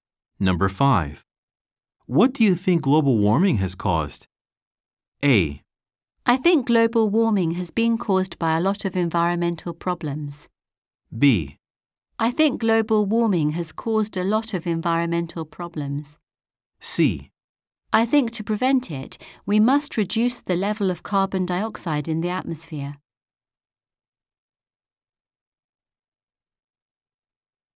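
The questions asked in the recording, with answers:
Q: What do you think global warming has caused?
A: B: I think global warming has caused a lot of environmental problems.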